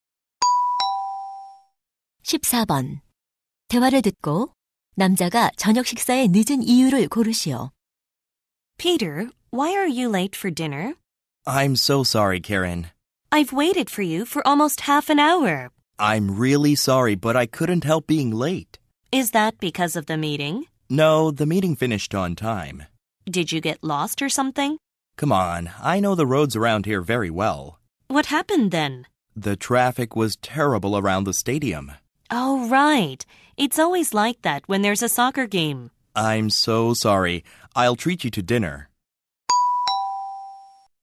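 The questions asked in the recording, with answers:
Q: 대화를 듣고 남자가 저녁 식사에 늦은 이유를 고르시오.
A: 경기장 주변 교통 체증 때문에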